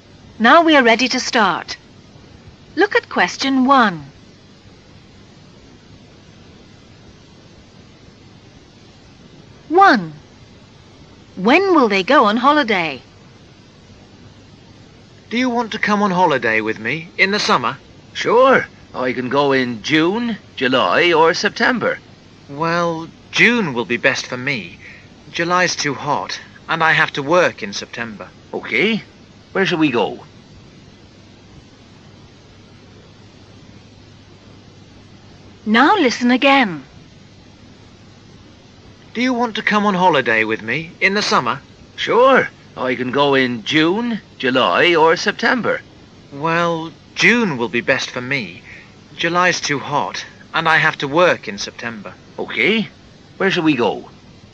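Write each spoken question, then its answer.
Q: When will they go on holiday?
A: In June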